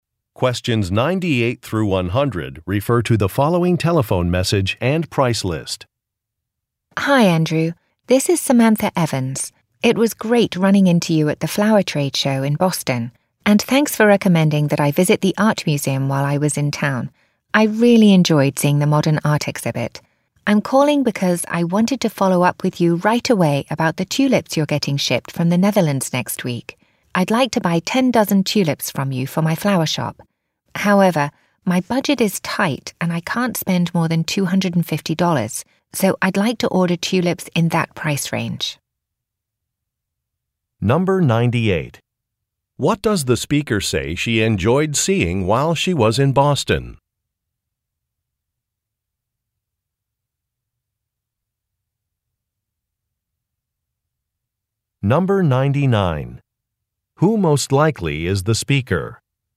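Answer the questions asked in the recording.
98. A modern art exhibit
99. A flower shop owner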